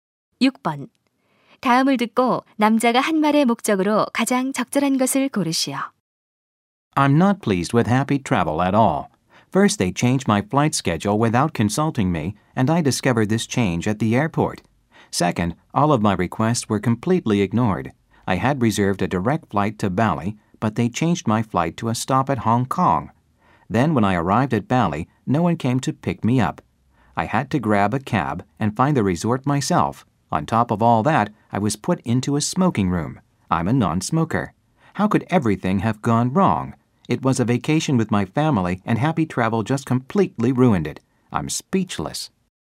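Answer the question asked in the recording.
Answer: 여행사 서비스에 대한 불만 제기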